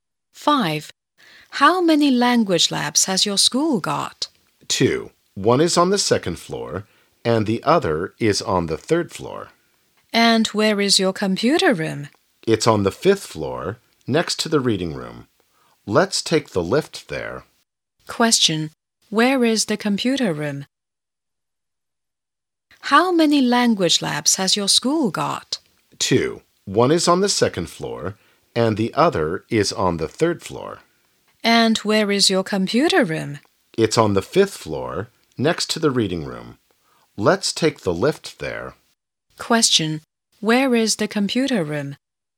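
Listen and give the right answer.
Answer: On the fifth floor, next to the reading room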